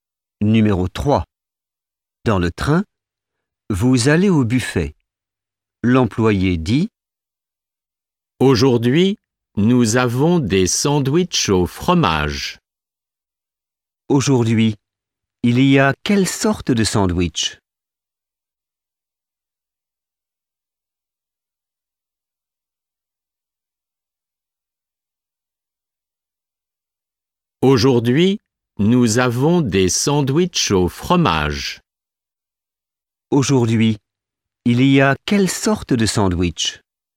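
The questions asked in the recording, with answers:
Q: Aujourd'hui, il y a quelle sorte de sandwich?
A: Des sandwichs au fromage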